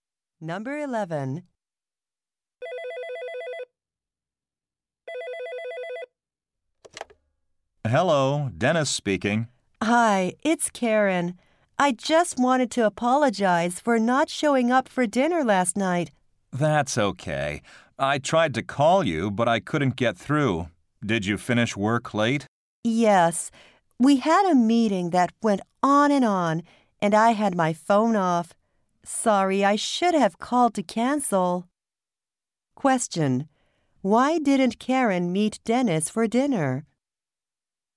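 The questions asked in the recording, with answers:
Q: Why didn't Karen meet Dennis for dinner?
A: She had a meeting at work that went on late.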